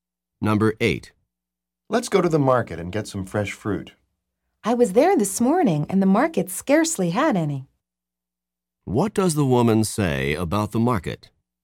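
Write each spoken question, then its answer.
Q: What does the woman say about the market?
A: It had almost no fresh fruit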